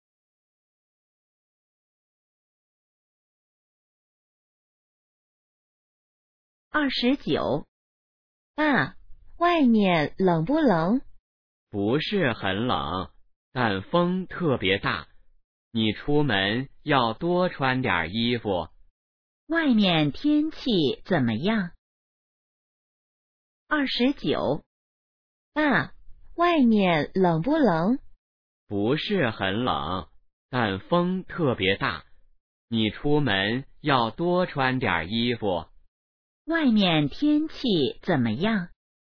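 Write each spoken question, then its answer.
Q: 外面天气怎么样?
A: 不是很冷,但风特别大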